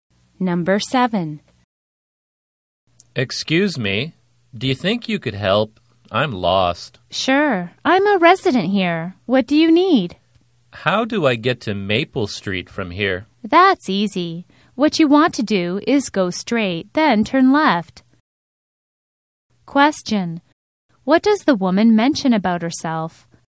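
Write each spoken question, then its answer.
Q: What does the woman mention about herself?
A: She is a resident there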